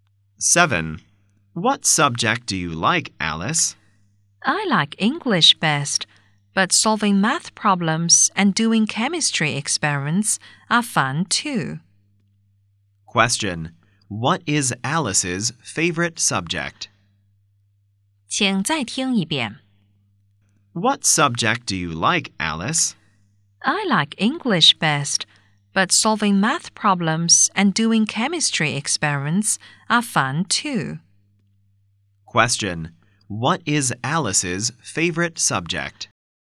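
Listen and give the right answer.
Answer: English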